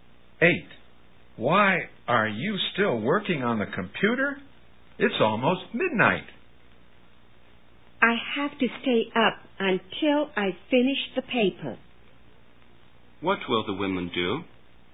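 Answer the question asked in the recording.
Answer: Stay up until she finishes the paper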